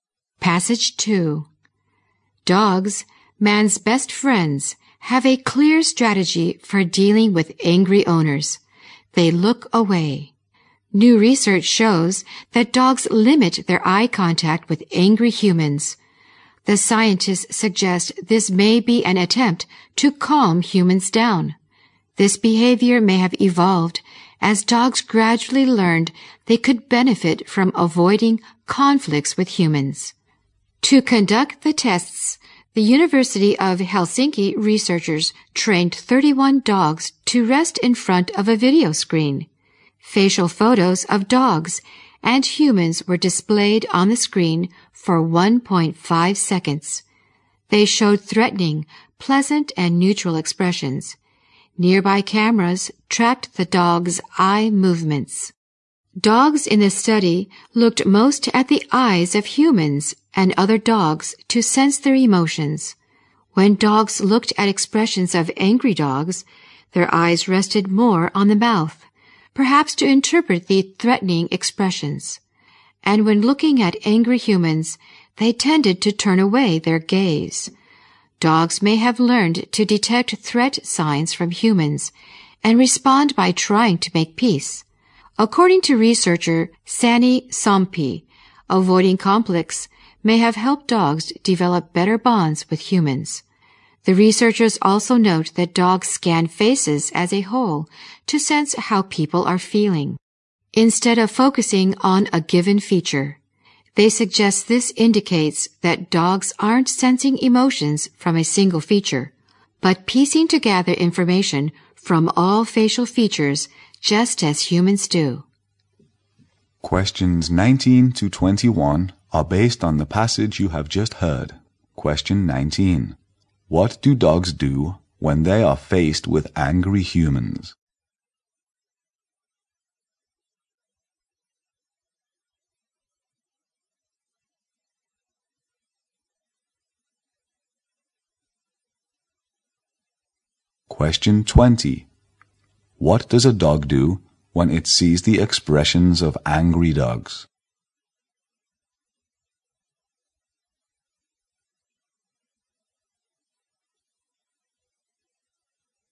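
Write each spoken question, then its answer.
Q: What do dogs do when they are faced with angry humans?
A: They look away and avoid eye contact

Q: What does a dog do when it sees the expressions of angry dogs?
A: Its eyes rest more on the mouth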